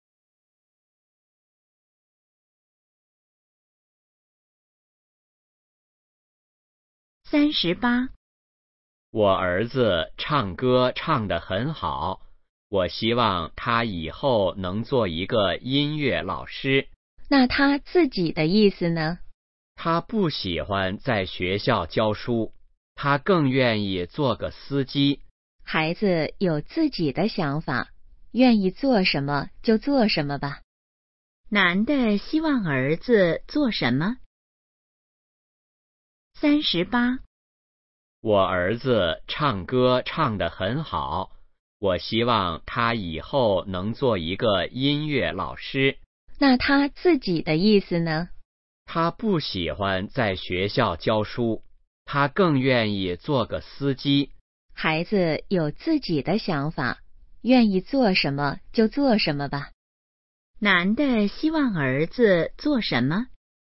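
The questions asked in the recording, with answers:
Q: 男的希望儿子做什么?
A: 音乐老师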